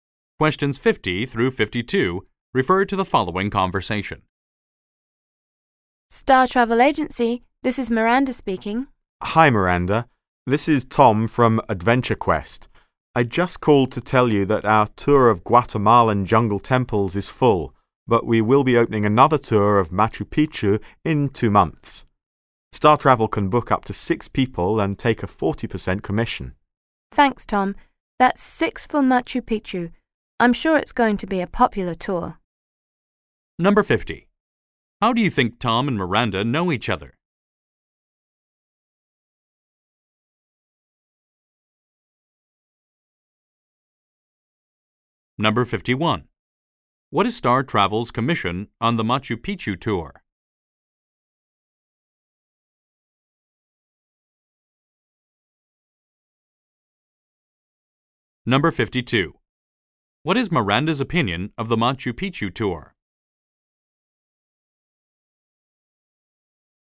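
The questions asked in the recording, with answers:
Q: What is Star Travel's commission on the Machu Picchu tour?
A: 40%

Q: What is Miranda's opinion of the Machu Picchu tour?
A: She thinks it will be popular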